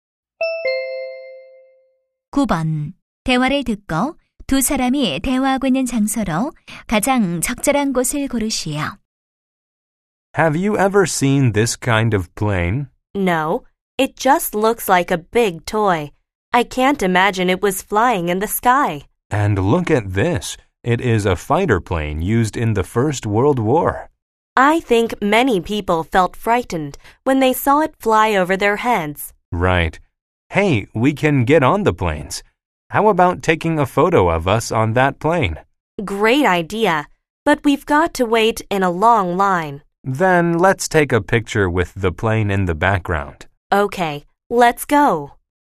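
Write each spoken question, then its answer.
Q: 대화를 듣고 두 사람이 대화하고 있는 장소로 가장 적절한 곳을 고르시오.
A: 항공 박물관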